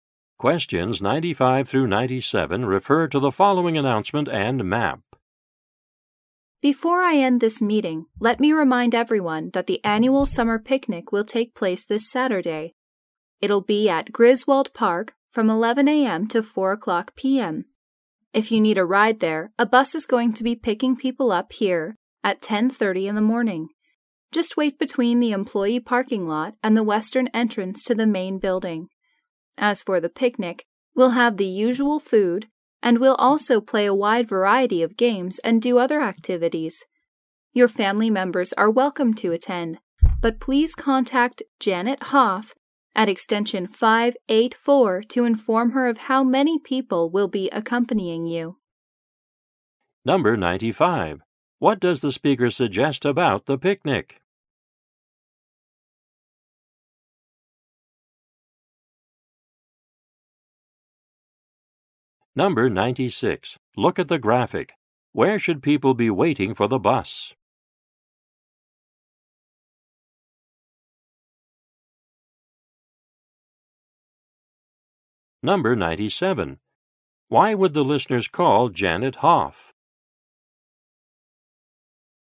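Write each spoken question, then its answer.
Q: Why would the listeners call Janet Hoff?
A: To tell her how many family members will attend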